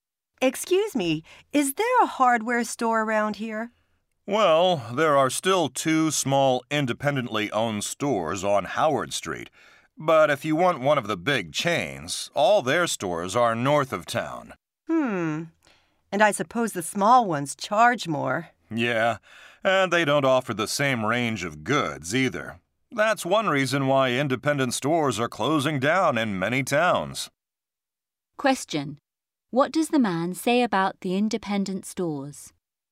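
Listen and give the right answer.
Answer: They charge more and don't offer as wide a range of goods.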